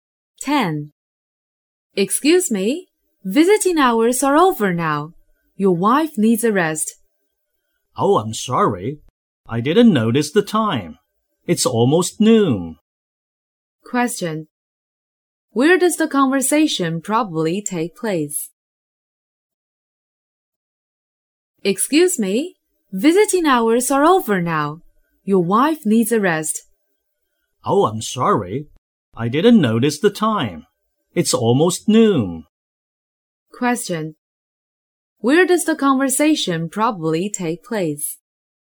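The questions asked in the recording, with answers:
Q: Where does the conversation probably take place?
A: In a hospital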